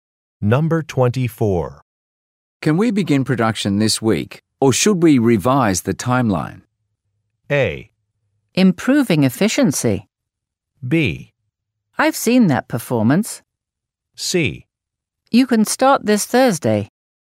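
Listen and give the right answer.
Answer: C: You can start this Thursday.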